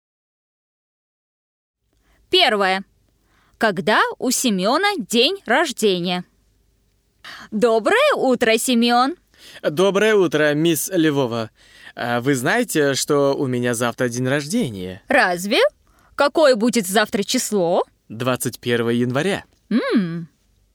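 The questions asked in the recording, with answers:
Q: Когда у Семёна день рождения?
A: 21 января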